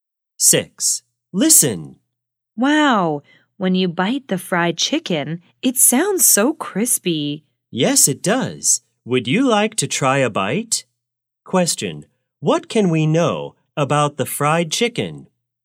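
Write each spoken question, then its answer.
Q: what can we know about the fried chicken?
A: It sounds crispy when you bite it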